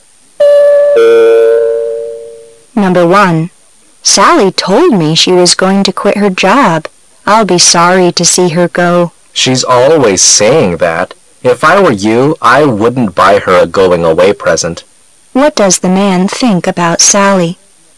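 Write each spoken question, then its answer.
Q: What does the man think about Sally?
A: He doesn't believe she will really quit her job.

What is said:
[解析] W: Sally told me she was going to quit her job. I'll be sorry to see her go. M: She's always saying that. If I were you I wouldn't buy her a going-away present. Q: What does the man think about Sally?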